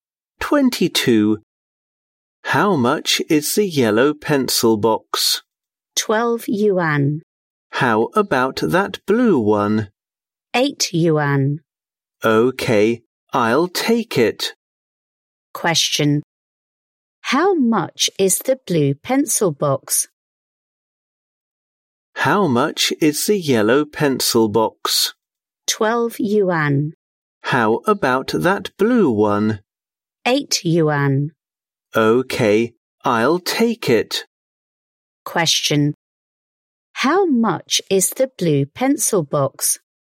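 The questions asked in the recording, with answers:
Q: Question. How much is the blue pencil box?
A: 8 yuan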